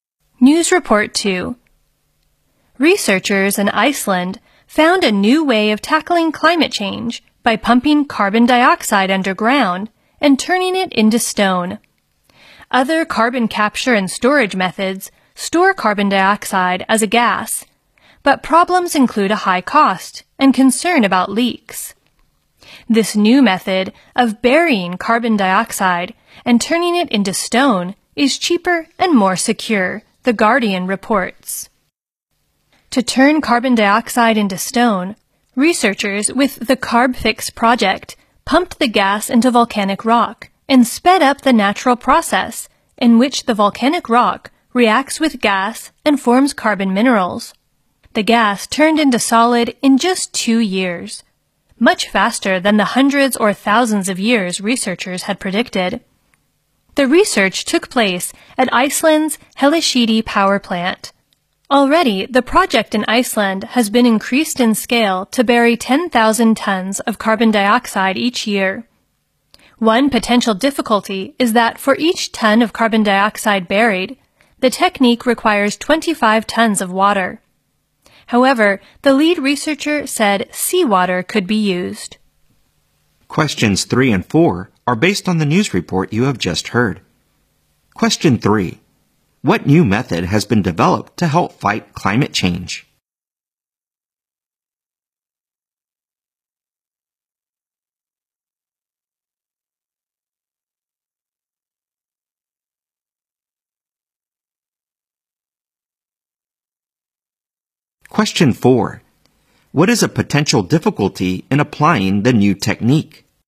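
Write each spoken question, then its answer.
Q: What new method has been developed to help fight climate change?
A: Pumping carbon dioxide underground and turning it into stone

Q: What is a potential difficulty in applying the new technique?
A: It needs 25 tons of water for each ton of carbon dioxide buried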